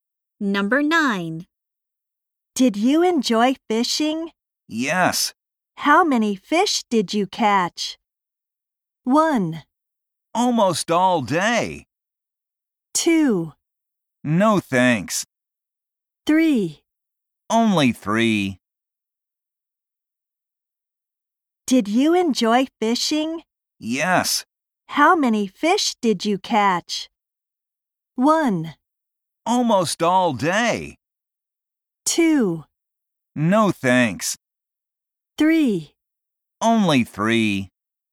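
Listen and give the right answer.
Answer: 3: Only 3.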